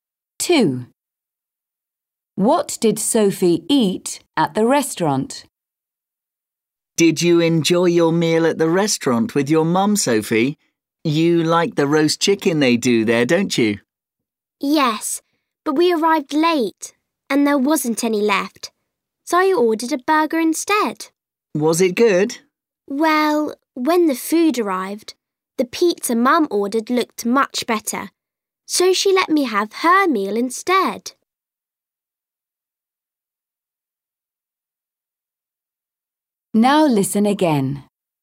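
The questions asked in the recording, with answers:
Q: What did Sophie eat at the restaurant?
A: pizza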